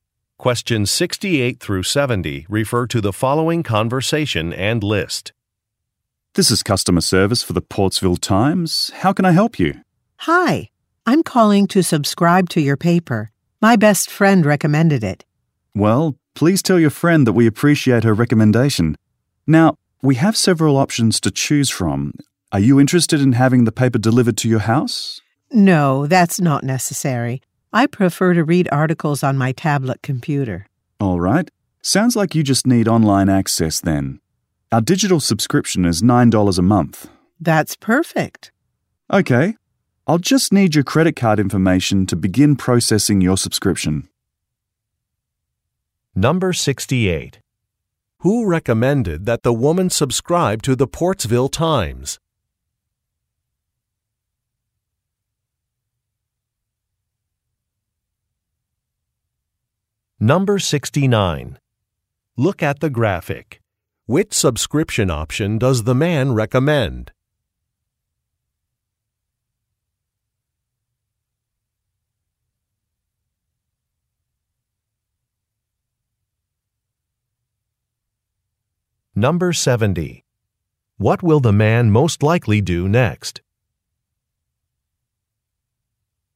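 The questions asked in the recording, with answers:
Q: Who recommended that the woman subscribe to the Portsville Times?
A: Her best friend

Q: What will the man most likely do next?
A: Take her credit card information to process the subscription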